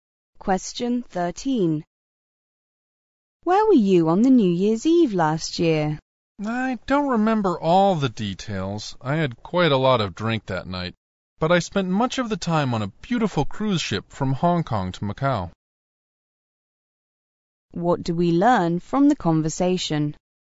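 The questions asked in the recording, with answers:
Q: What do we learn from the conversation?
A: The man spent New Year's Eve on a cruise ship from Hong Kong to Macau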